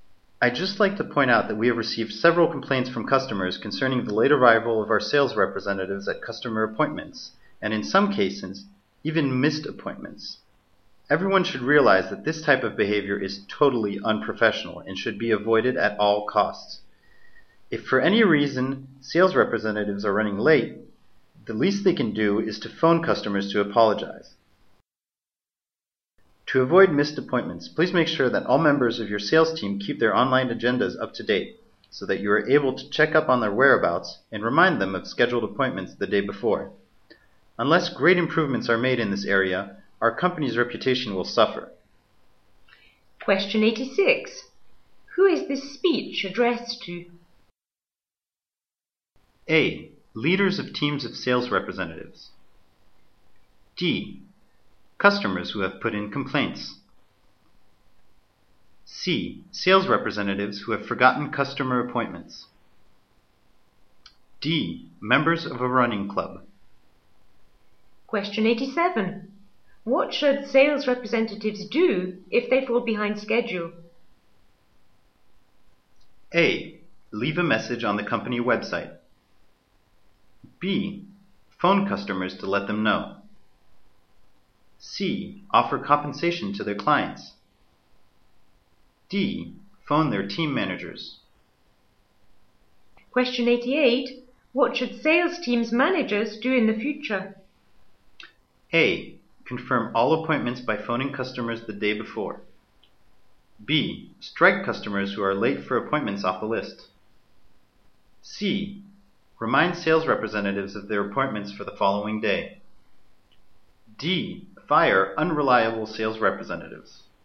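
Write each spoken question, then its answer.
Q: Who is this speech addressed to?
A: A: Leaders of teams of sales representatives.

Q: What should sales representatives do if they fall behind schedule?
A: B: Phone customers to let them know.

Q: What should sales teams' managers do in the future?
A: C: Remind sales representatives of their appointments for the following day.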